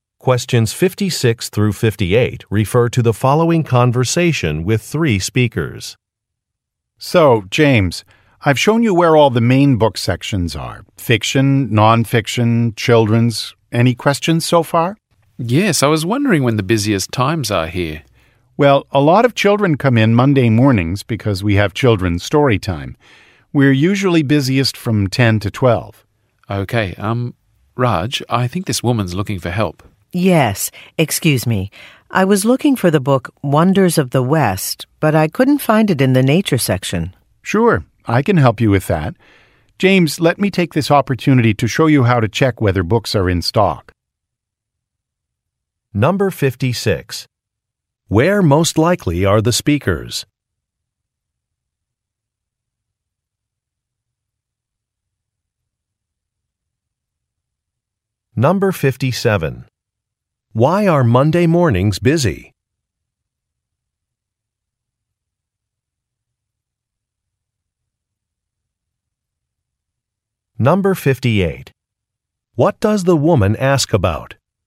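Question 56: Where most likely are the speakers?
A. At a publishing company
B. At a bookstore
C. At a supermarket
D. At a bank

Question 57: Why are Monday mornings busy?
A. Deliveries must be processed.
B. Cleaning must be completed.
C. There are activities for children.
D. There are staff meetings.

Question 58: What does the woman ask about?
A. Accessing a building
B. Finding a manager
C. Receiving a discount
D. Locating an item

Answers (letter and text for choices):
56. B. At a bookstore
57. C. There are activities for children.
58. D. Locating an item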